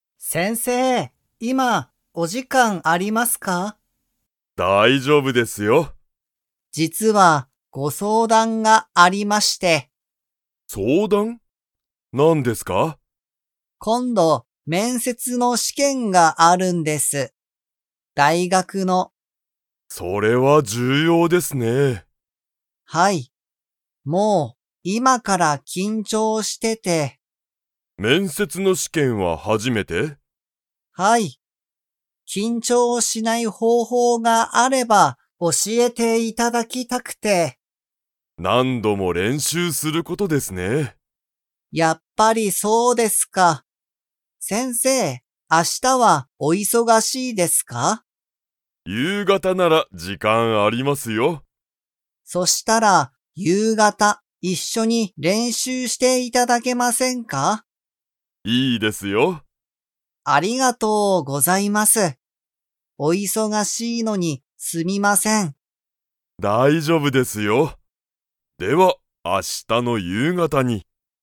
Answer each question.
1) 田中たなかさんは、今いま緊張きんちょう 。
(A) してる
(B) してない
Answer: (A) してる

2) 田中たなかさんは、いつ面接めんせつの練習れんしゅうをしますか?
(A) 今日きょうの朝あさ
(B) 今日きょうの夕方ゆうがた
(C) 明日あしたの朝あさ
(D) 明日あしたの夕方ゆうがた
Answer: (D) 明日あしたの夕方ゆうがた

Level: Level 4

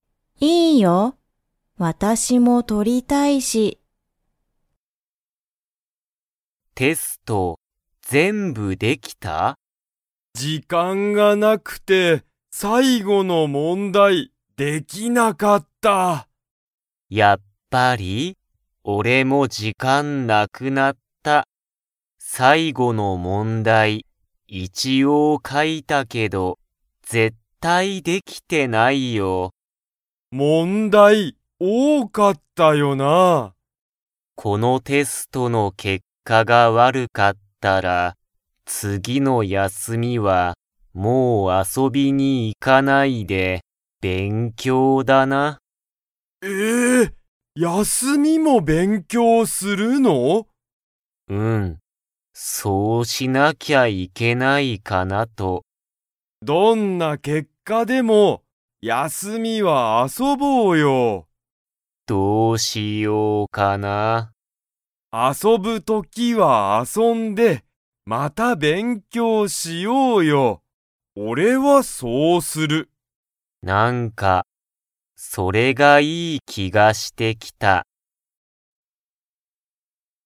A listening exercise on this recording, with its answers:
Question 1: リョウは、どの問題(もんだい)ができませんでしたか?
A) 新(あたら)しい問題(もんだい)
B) 簡単(かんたん)な問題(もんだい)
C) 最初(さいしょ)の問題(もんだい)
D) 最後(さいご)の問題(もんだい)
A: D) 最後(さいご)の問題(もんだい)

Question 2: リョウは、次(つぎ)の休(やす)みに勉強(べんきょう)しますか?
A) はい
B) いいえ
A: B) いいえ

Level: Level 2

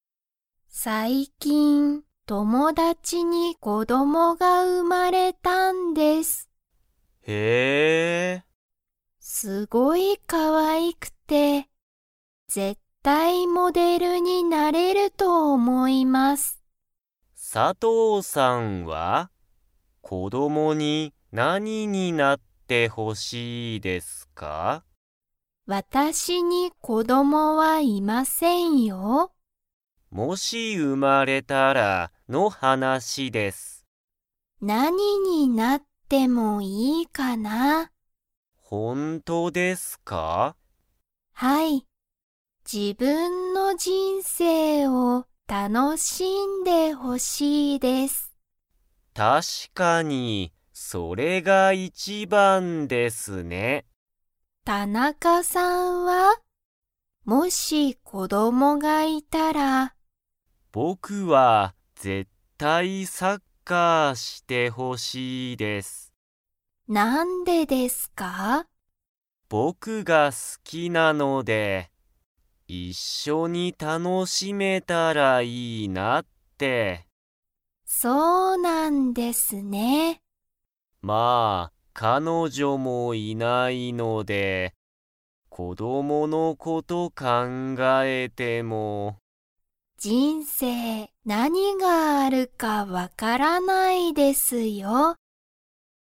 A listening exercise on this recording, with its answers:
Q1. 佐藤(さとう)さんは、子(こ)どもがいますか?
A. はい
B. いいえ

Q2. 田中(たなか)さんは、____が好(す)きだ。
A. 子(こ)ども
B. 人生(じんせい)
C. サッカー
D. モデル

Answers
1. B. いいえ
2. C. サッカー

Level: Level 2

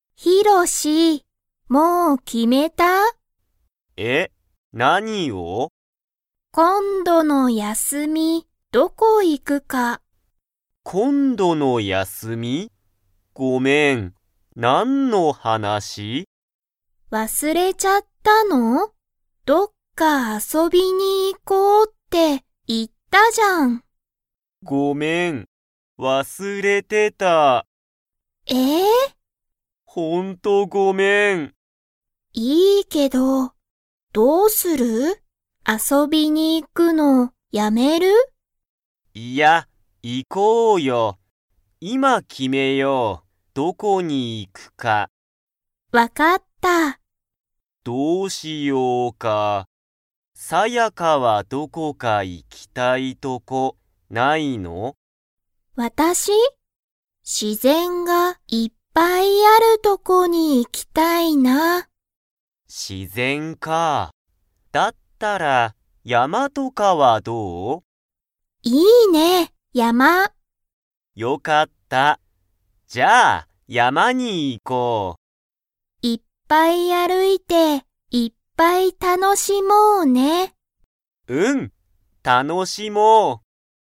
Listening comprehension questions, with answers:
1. サヤカとヒロシは、今度(こんど)の休(やす)みに遊(あそ)びに行(い)きますか?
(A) はい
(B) いいえ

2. サヤカは、____がいっぱいあるとこに行(い)きたい。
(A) 山(やま)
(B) 休(やす)み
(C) お金(かね)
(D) 自然(しぜん)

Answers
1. (A) はい
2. (D) 自然(しぜん)

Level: Level 2

